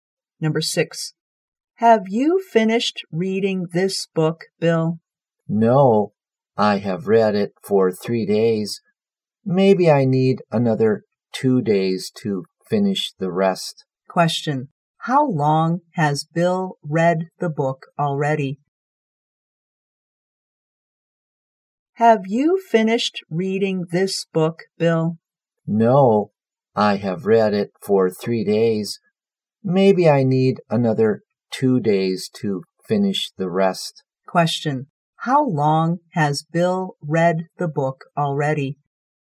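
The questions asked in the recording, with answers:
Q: how long has Bill read the book already?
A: For 3 days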